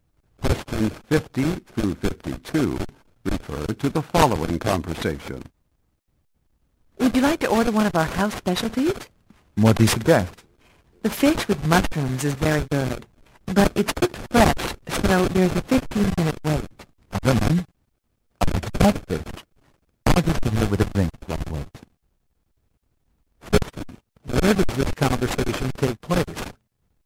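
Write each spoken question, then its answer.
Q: Where does this conversation take place?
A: In a restaurant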